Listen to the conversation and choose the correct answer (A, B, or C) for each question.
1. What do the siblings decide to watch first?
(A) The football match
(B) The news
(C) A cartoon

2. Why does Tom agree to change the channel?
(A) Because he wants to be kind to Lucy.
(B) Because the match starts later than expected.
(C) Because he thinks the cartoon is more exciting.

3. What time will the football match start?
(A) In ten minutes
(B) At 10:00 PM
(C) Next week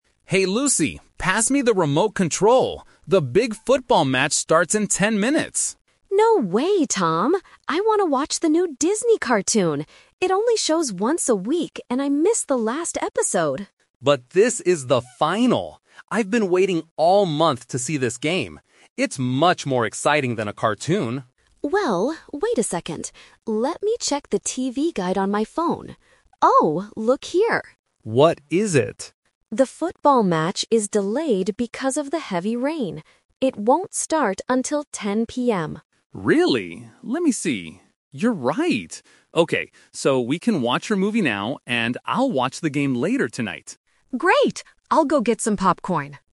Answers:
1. A cartoon
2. Because the match starts later than expected.
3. At 10:00 PM

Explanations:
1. Although Tom wants to watch football (Option A), they eventually agree to watch Lucy's cartoon first because the match is delayed. Option B is not mentioned.
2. Lucy checks the guide and finds out the match is "delayed because of the heavy rain". Tom then says, "Okay, so we can watch your movie now". He doesn't change his mind because he likes the cartoon (Option C) or just to be kind (Option A).
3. Tom initially says the match starts in "ten minutes" (Option A is the trap), but Lucy clarifies that it "won't start until 10:00 PM". Option C is not mentioned.

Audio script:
Tom: Hey Lucy, pass me the remote control. The big football match starts in ten minutes!
Lucy: No way, Tom! I want to watch the new Disney cartoon. It only shows once a week and I missed the last episode.
Tom: But this is the final! I've been waiting all month to see this game. It's much more exciting than a cartoon.
Lucy: Well... wait a second. Let me check the TV guide on my phone. Oh! Look here.
Tom: What is it?
Lucy: The football match is delayed because of the heavy rain.
Tom: Really? Let me see... You're right. Okay, so we can watch your movie now, and I'll watch the game later tonight.

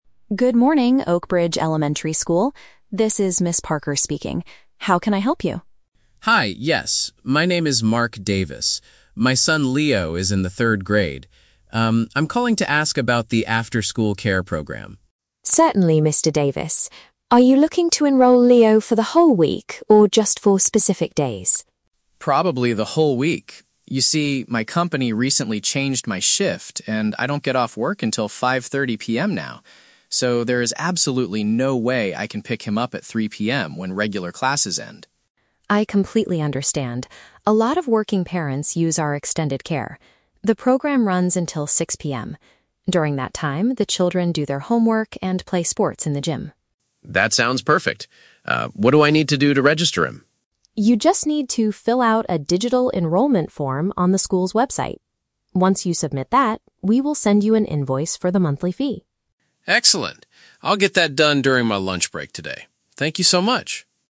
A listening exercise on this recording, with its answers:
Listen to the phone conversation between a parent (Mr. Davis) and a school secretary (Ms. Parker), and choose the correct answer (A, B, or C).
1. Why is Mr. Davis contacting the school?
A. He is calling to report that his son will be absent for a week.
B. He needs a supervised place for his son to stay after normal classes.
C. He wants to apply for a teaching position in the afternoon.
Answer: He needs a supervised place for his son to stay after normal classes.

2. What is the main reason for Mr. Davis's problem?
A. His daily working hours were recently modified by his employer.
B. His son Leo wants to stay at school longer to play sports with friends.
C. He was recently promoted to a new department at his company.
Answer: His daily working hours were recently modified by his employer.

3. What is the first step Mr. Davis must take to register his son?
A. Visit the school's main office during his lunch break today.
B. Pay the monthly fee invoice sent by the school secretary.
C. Complete an application document on the internet.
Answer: Complete an application document on the internet.

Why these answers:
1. Mr. Davis asks about the "after-school care program" because he cannot pick up his son when "regular classes end."
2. Mr. Davis explains that his "company recently changed my shift," which means his working hours were modified.
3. Ms. Parker tells him to "fill out a digital enrollment form on the school's website." Completing an application document on the internet is a direct paraphrase of this action.

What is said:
Parker speaking. How can I help you?
Mr. Davis: Hi, yes. My name is Mark Davis. My son Leo is in the third grade. Um, I'm calling to ask about the after-school care program.
Parker: Certainly, Mr. Davis. Are you looking to enroll Leo for the whole week or just for specific days?
Mr. Davis: Probably the whole week. You see, my company recently changed my shift, and I don't get off work until 5:30 PM now. So, there is absolutely no way I can pick him up at 3:00 PM when regular classes end.
Parker: I completely understand. A lot of working parents use our extended care. During that time, the children do their homework and play sports in the gym.
Mr. Davis: That sounds perfect. Ah, what do I need to do to register him?
Parker: You just need to fill out a digital enrollment form on the school's website. Once you submit that, we will send you an invoice for the monthly fee.
Mr.

